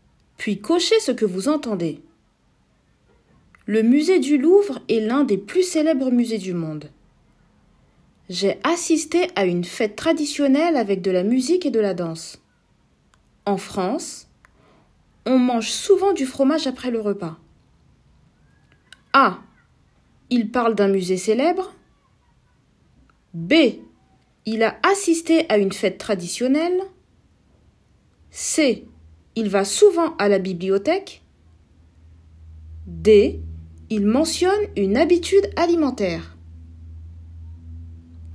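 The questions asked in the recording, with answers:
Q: écoutez les phrases suivantes, puis cochez ce que vous entendez.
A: A: Il parle d'un musée célèbre. B: Il a assisté à une fête traditionnelle. D: Il mentionne une habitude alimentaire.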